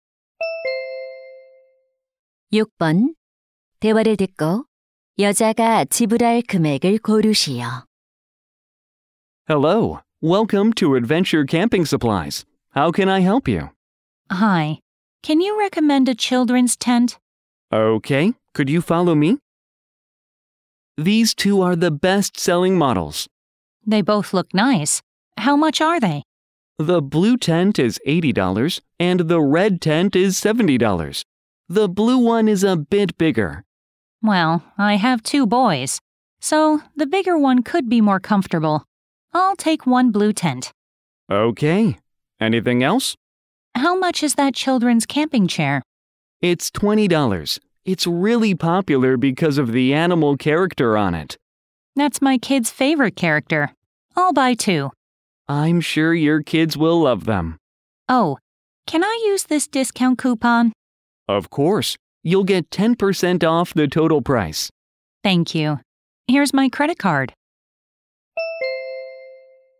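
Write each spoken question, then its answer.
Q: 대화를 듣고 여자가 지불할 금액을 고르시오.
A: 108달러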